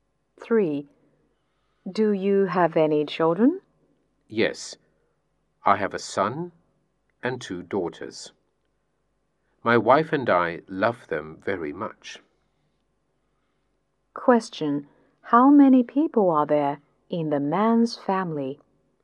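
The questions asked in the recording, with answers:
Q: How many people are there in the man's family?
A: Five.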